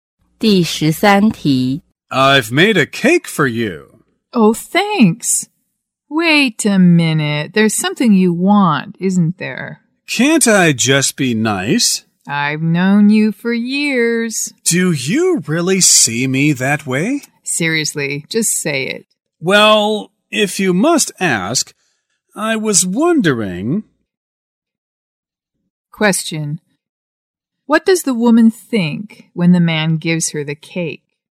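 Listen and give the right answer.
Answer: He wants something from her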